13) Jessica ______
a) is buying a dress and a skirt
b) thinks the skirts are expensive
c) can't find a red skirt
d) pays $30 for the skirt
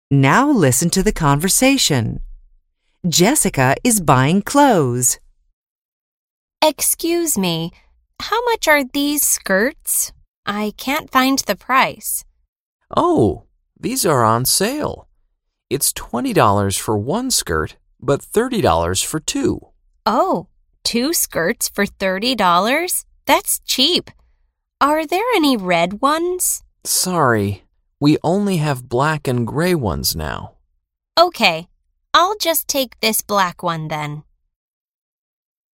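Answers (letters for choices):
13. c

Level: BEGINNERS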